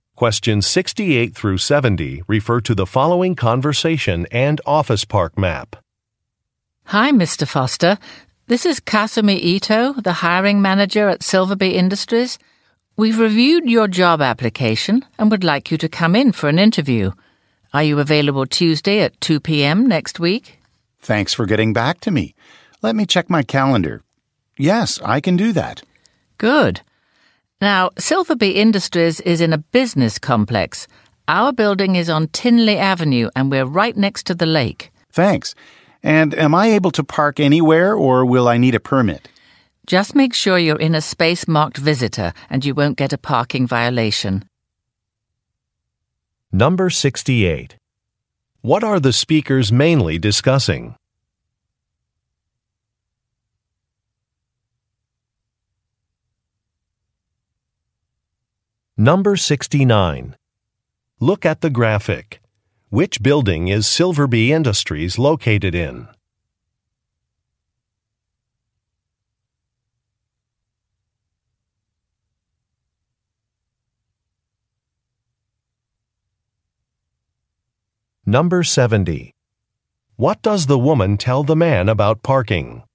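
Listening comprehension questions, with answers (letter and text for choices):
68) What are the speakers mainly discussing?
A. A job interview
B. A company celebration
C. An office relocation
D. A landscaping project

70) What does the woman tell the man about parking?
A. He should park in a visitor's space.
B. He will have to pay at a meter.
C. A parking pass is required.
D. The parking area fills up quickly.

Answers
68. A. A job interview
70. A. He should park in a visitor's space.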